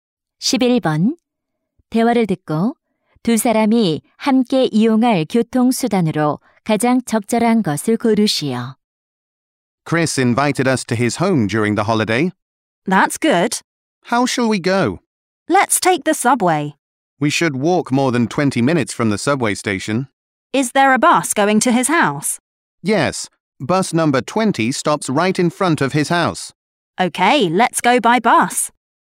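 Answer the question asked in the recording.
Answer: 버스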